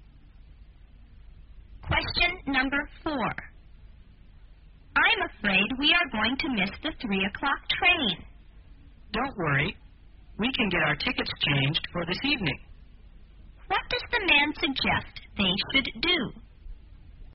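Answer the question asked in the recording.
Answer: Get their tickets changed for an evening train.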